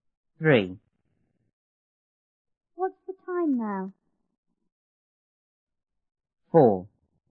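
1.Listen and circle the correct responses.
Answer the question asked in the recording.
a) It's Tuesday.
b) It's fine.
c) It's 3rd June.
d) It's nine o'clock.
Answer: d) It's nine o'clock.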